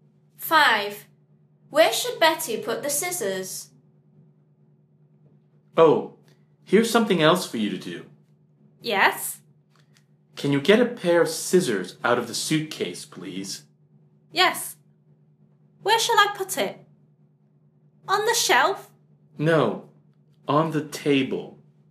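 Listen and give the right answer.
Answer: on the table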